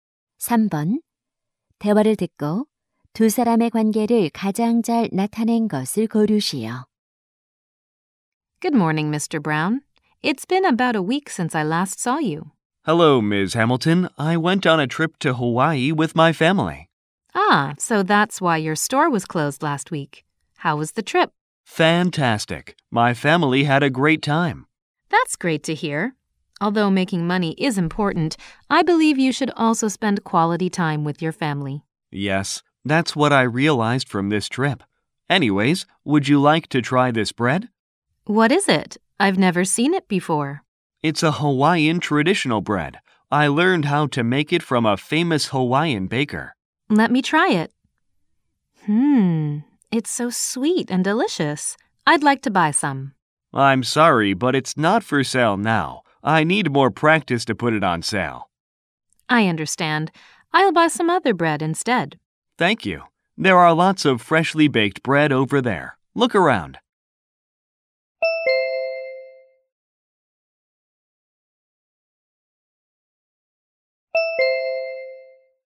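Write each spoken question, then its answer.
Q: 대화를 듣고 두 사람의 관계를 가장 잘 나타낸 것을 고르시오.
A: 빵집 주인 - 손님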